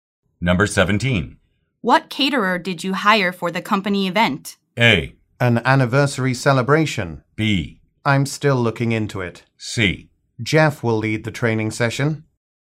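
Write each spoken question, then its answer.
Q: What caterer did you hire for the company event?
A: B: I'm still looking into it.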